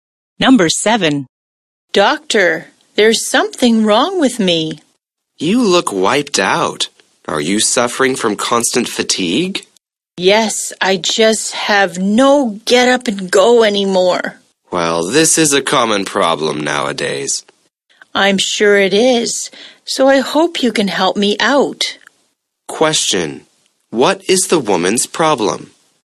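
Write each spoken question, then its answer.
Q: what is the woman's problem?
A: Constant fatigue (she feels tired all the time)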